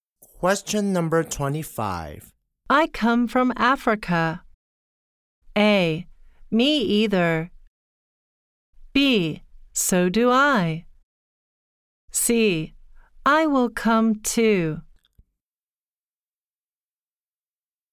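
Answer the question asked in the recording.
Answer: B: So do I.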